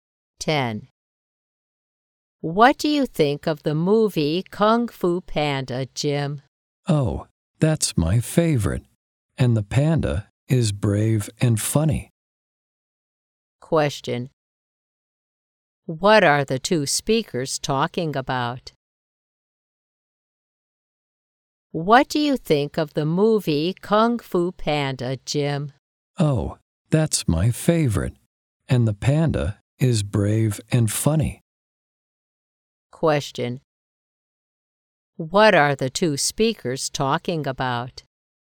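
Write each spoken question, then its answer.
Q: What are the two speakers talking about?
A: The movie Kung Fu Panda.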